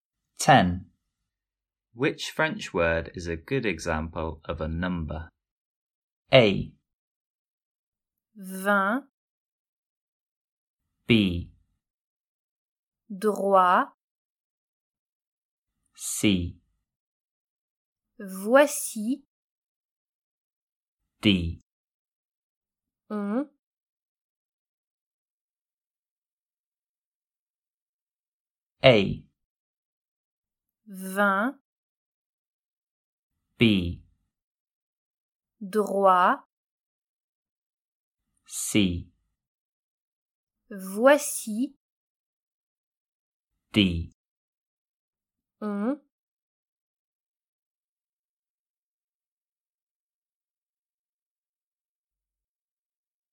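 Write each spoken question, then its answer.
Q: Which French word is a good example of a number?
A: A: Vingt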